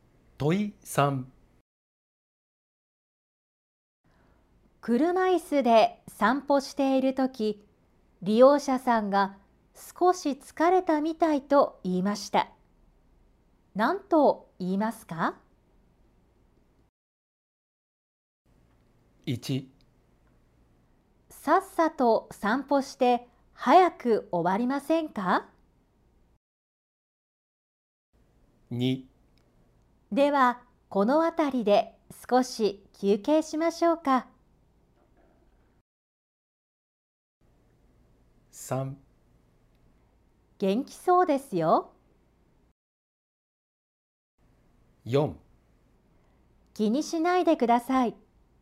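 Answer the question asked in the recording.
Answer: 2: ではこのあたりで少し休憩しましょうか。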